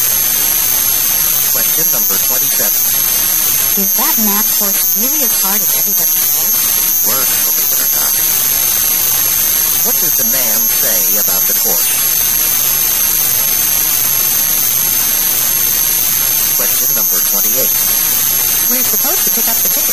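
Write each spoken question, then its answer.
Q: What does the man say about the course?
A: It is even harder than people say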